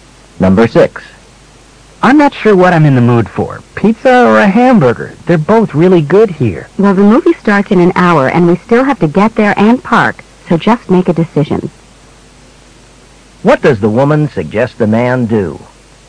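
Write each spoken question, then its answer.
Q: What does the woman suggest the man do?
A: Decide quickly what to eat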